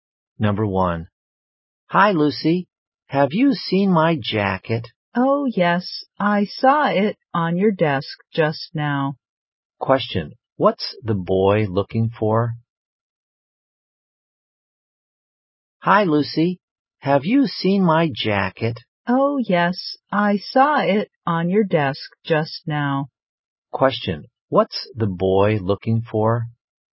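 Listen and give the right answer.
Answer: His jacket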